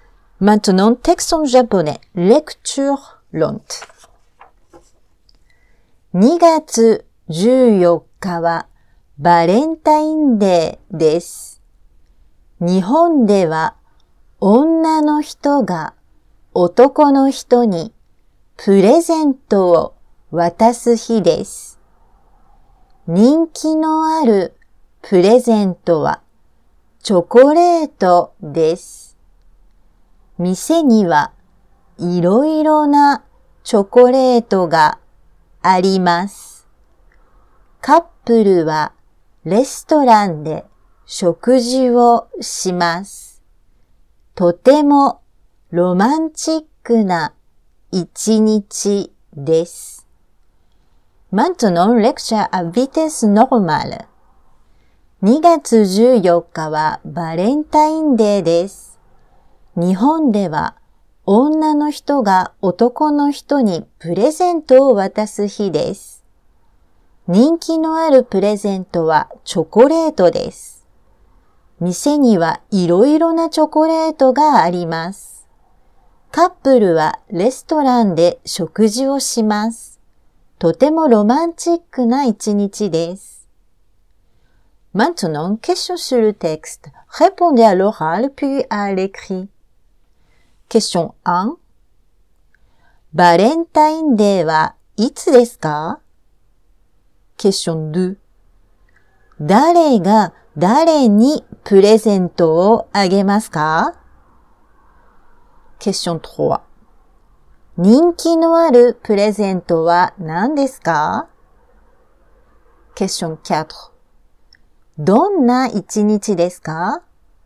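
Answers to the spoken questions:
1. 2月14日です。
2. 女の人が男の人にあげます。
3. チョコレートです。
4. とてもロマンチックな一日です。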